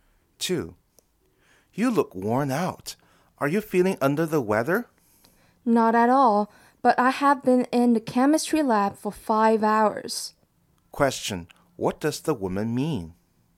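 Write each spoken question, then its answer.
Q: What does the woman mean?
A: She is tired from working in the chemistry lab for 5 hours, not ill.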